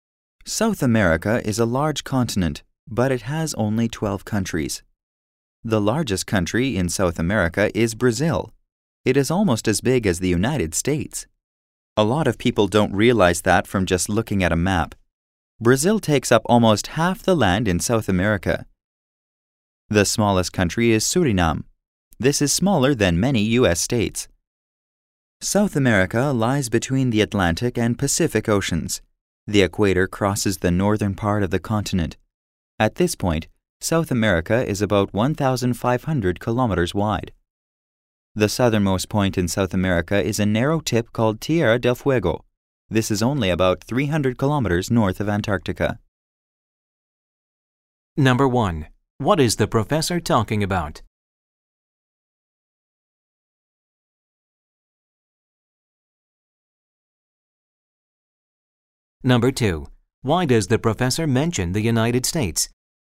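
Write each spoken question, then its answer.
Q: What is the professor talking about?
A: The geography of South America

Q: Why does the professor mention the United States?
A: To compare its size with Brazil's (Brazil is almost as big as the United States)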